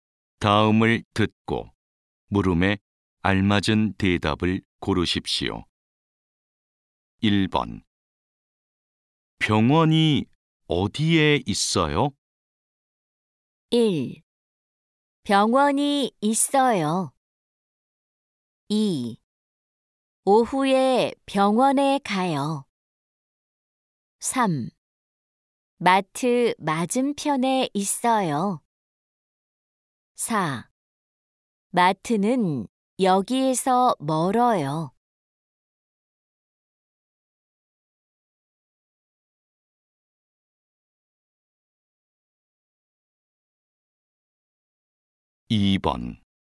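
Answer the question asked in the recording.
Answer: 3: 마트 맞은편에 있어요.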